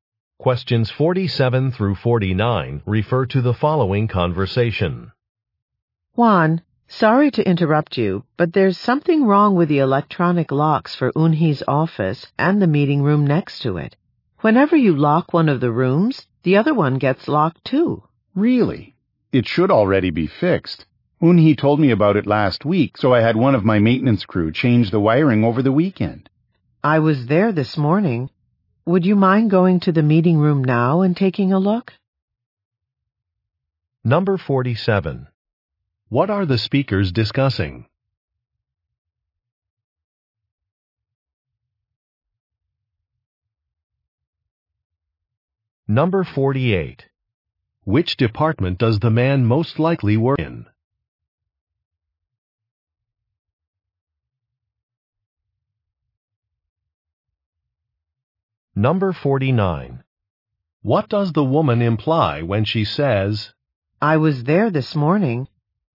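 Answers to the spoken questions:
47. A problem with electronic door locks
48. Maintenance
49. The problem has not been fixed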